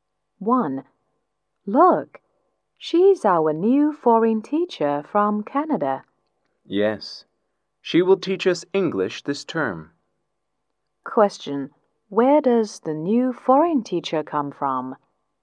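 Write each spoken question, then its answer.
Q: Question, where does the new foreign teacher come from?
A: Canada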